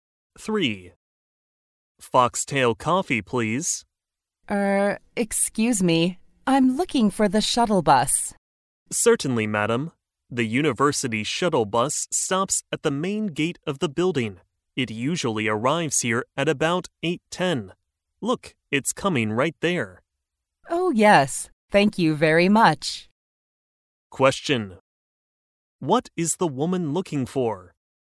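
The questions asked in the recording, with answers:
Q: What is the woman looking for?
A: The university shuttle bus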